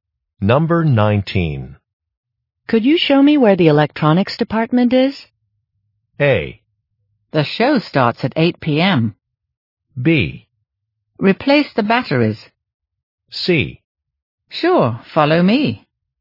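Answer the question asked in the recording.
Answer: C: Sure, follow me.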